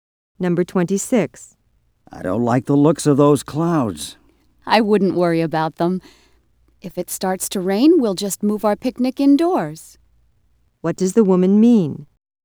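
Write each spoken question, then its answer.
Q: What does the woman mean?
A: Rain won't be a problem because they can move the picnic indoors.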